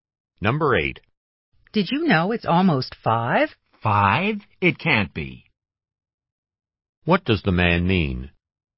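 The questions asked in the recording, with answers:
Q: What does the man mean?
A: He is surprised that it is so late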